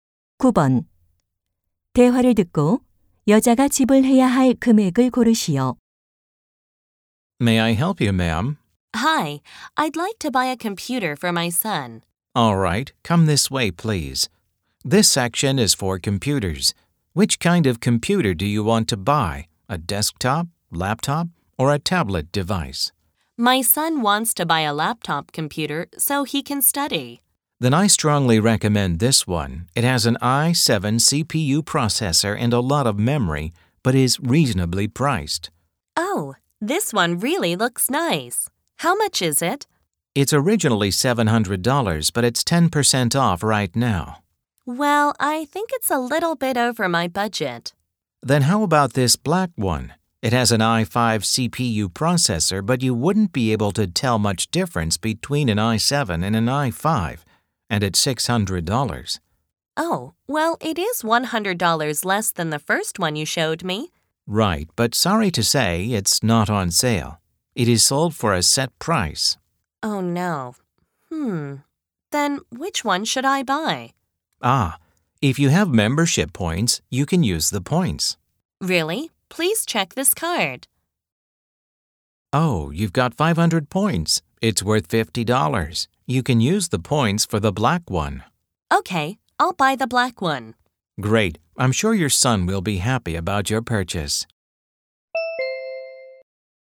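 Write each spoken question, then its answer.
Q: 대화를 듣고 여자가 지불해야 할 금액을 고르시오.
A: $550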